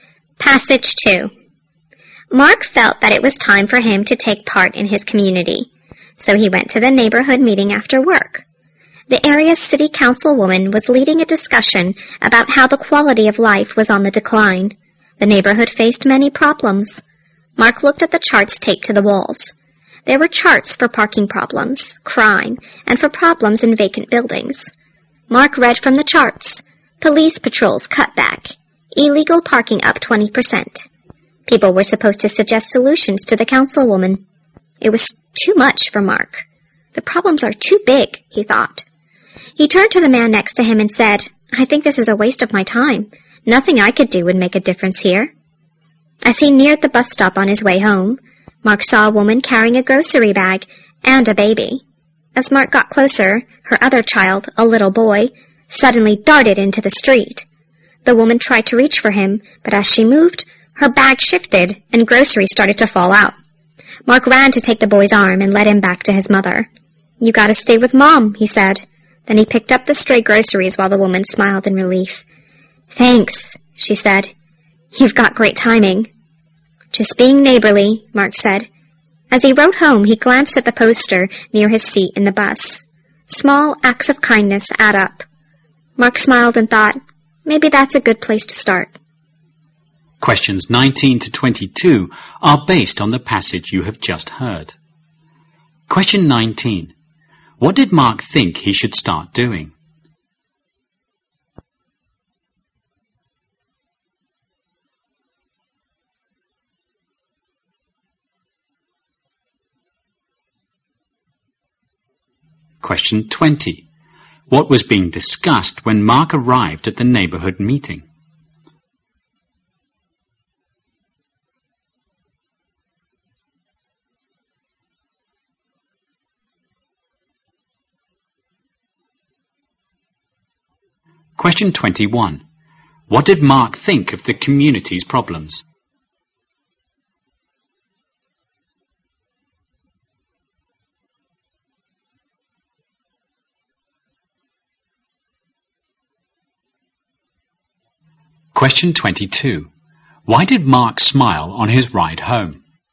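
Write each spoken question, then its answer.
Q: What did Mark think he should start doing?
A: Taking part in his community

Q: What was being discussed when Mark arrived at the neighborhood meeting?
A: How the neighborhood's quality of life was declining

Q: What did Mark think of the community's problems?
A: They were too big for him to make any difference

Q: Why did Mark smile on his ride home?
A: He realized that small acts of kindness add up and were a good place to start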